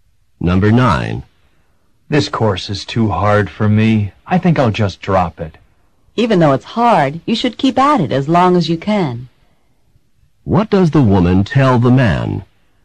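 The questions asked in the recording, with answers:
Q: What does the woman tell the man?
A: He should keep trying in the course, not drop it.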